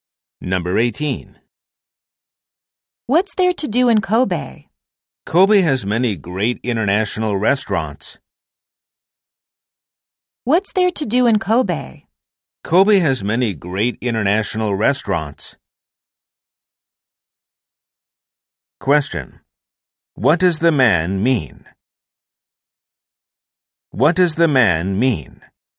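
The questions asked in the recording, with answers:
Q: What does the man mean?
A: Kobe has many great international restaurants.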